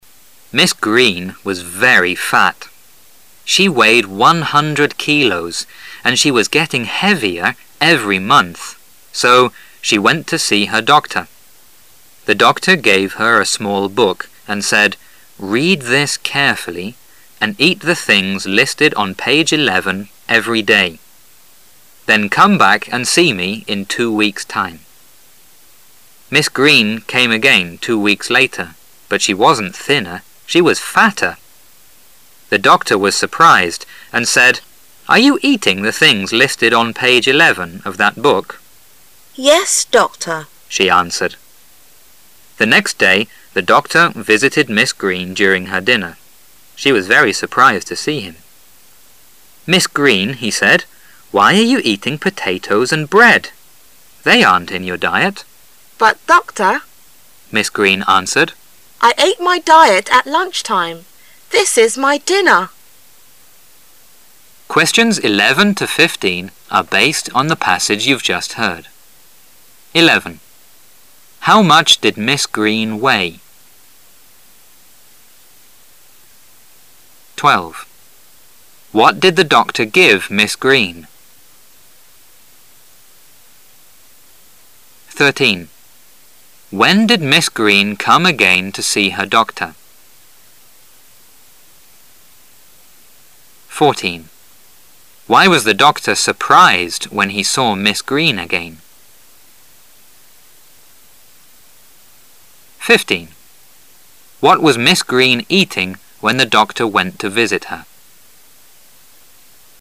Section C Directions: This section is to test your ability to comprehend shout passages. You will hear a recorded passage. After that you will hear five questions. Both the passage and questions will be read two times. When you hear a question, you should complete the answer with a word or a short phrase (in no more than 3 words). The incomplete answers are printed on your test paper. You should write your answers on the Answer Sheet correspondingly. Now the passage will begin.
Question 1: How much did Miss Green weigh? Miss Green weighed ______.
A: 100 kilos

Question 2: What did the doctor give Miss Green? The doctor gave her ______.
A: a small book

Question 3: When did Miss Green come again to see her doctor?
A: two weeks later

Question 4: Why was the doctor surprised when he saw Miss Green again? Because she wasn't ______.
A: thinner

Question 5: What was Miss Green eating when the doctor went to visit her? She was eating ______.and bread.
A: potatoes

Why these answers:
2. 本题是问医生给了Miss Green什么。答案出自The doctor gave her a small book。
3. 本题是问Miss Green第二次是什么时候去见的医生。答案出自Miss Green came。again two weeks later,注意抓住关键词come again。
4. 本题是问为什么医生再次看到Miss Green时感到吃惊。答案出自but she wasn't thinner,she was fatter.The doctor was surprised,抓住关键词surprised,注意从其前后寻找答案,尤其在第二遍听音时。
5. 本题是问当医生去看Miss Green时,她在吃什么。答案出自"Why are you eating potatoes and bread?"。

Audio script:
She weighed 100 kilos, and she was getting heavier every month, so she went to see her doctor. The doctor gave her a small boob and said, "Read this carefully and eat the things listed on page 11 every day. Then come back and see me in two weeks' time." Miss Green came again two weeks later, but she wasn't thinner, she was fatter. The doctor was surprised and said, "Are you eating the things listed on page 11 of that book?" "Yes, doctor." She answered. The next day the doctor visited Miss Green during her dinner. She was very surprised to see him. "Miss Green," he said, "Why are you eating-- potatoes and bread? They aren' t in your diet." "But, doctor," Miss Green answered, "I ate my diet at lunch time. This is my dinner." 11. How much did Miss Green weigh?
a small book
[解析] What did the doctor give Miss Green?